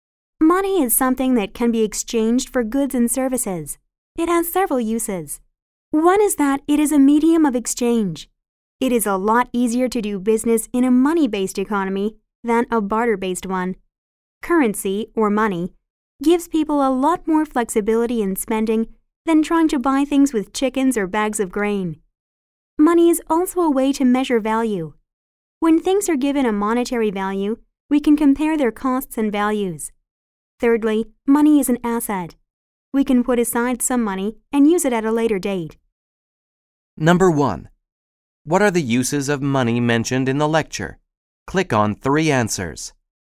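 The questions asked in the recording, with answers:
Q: What are the uses of money mentioned in the lecture?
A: A medium of exchange, a way to measure value, and an asset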